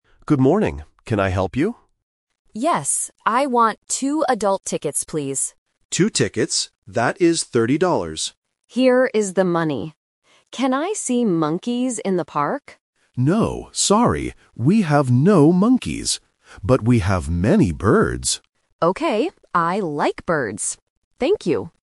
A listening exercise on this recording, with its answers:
Listen to the conversation and choose the correct answer (A, B, or C).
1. How many tickets does the tourist want?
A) 1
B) 2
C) 12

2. How much is the total price?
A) $13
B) $3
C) $30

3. What animal can the tourist see in the park?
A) Monkeys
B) Birds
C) Tigers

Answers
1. B) 2
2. C) $30
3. B) Birds

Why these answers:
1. The tourist says "I want two adult tickets" and the agent repeats "Two tickets". Option (C) 12 is a sound distractor (bẫy âm thanh giữa "two" và "twelve").
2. The agent says "thirty dollars". Option (A) $13 is a classic A1 trap (thirteen vs. thirty).
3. The agent says "But we have many birds." Option (A) "Monkeys" is a trap because the tourist asks about them, but the agent says "No, we have no monkeys." Option (C) is not mentioned.

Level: A1

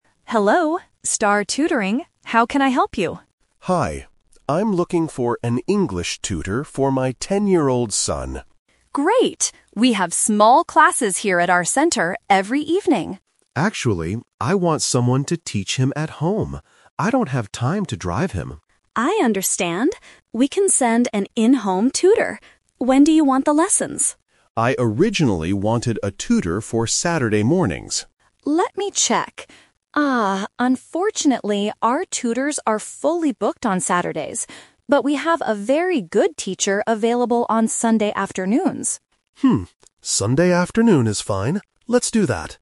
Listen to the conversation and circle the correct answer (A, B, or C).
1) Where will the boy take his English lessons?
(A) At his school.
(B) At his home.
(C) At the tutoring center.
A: (B) At his home.

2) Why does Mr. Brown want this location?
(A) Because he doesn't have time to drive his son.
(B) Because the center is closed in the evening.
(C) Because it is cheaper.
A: (A) Because he doesn't have time to drive his son.

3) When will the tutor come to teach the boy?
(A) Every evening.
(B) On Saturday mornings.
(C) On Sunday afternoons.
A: (C) On Sunday afternoons.

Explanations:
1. Mr. Brown explicitly says, "Actually, I want someone to teach him at home." Why the trap is wrong: Option (C) is the trap. The staff mentions they have classes "here at our center," but the father rejects this idea. Option (A) was not mentioned.
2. After stating he wants a tutor at home, Mr. Brown gives the reason: "I don't have time to drive him." Why the trap is wrong: Option (B) is a trap. The center is actually open because they have classes "every evening." Option (C) is a plausible guess but was not mentioned in the conversation.
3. They agree on the final schedule at the end of the conversation: "But we have a very good teacher available on Sunday afternoons." and Mr. Brown replies, "Sunday afternoon is fine." Why the trap is wrong: Option (B) is the main trap (The Twist). Mr. Brown "originally wanted" Saturday mornings, but the tutors are fully booked. Option (A) is the schedule for the classes at the center, not the in-home tutor.

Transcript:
Staff: Hello, Star Tutoring. How can I help you?
Mr. Brown: Hi. I'm looking for an English tutor for my ten-year-old son.
Staff: Great. We have small classes here at our center every evening.
Brown: Actually, I want someone to teach him at home. I don't have time to drive him.
Staff: I understand. We can send an in-home tutor. When do you want the lessons?
Mr. Brown: I originally wanted a tutor for Saturday mornings.
Staff: Let me check. Ah, unfortunately, our tutors are fully booked on Saturdays. But we have a very good teacher available on Sunday afternoons.

